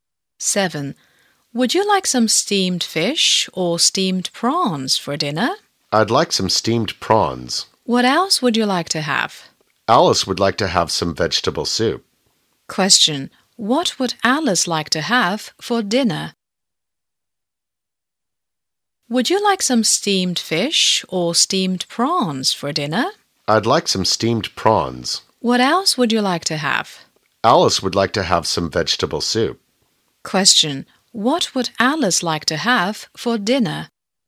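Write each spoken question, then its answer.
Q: What would Alice like to have for dinner?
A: Vegetable soup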